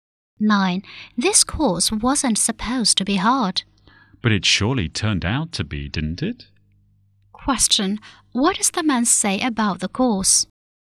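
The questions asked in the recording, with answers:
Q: What does the man say about the course?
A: It turned out to be hard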